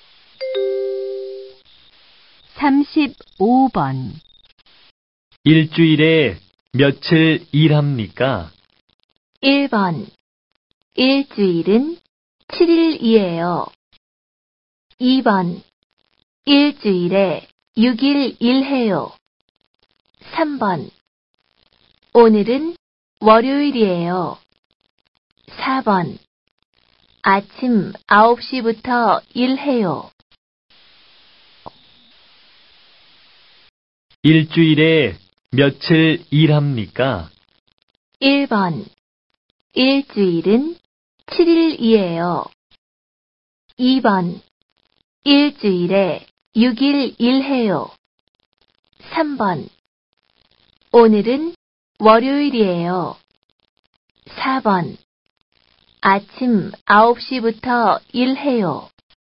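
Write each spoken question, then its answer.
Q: 일주일에 며칠 일합니까?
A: 2: 일주일에 6일 일해요.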